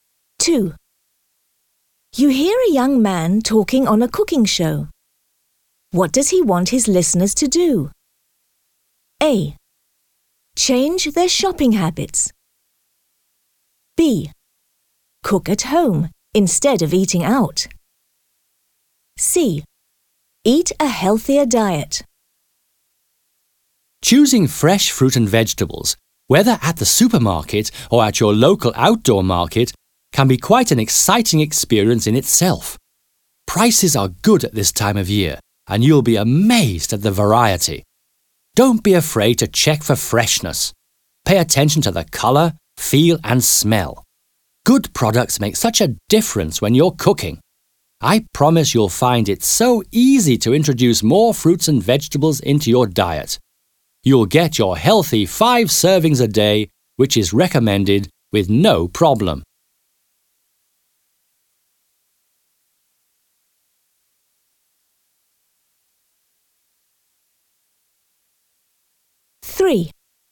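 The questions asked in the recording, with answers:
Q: What does he want his listeners to do?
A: C: Eat a healthier diet.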